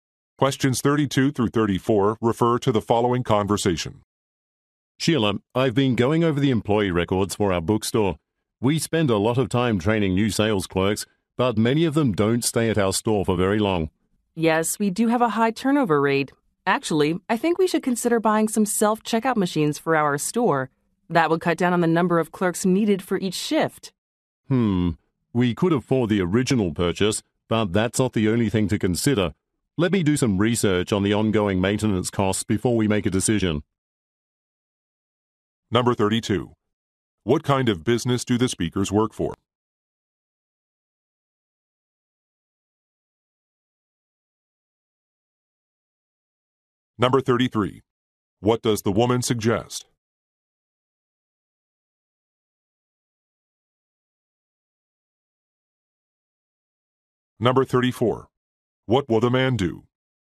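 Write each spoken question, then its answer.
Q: What kind of business do the speakers work for?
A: A bookstore

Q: What does the woman suggest?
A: Buying self-checkout machines

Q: What will the man do?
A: Research ongoing maintenance costs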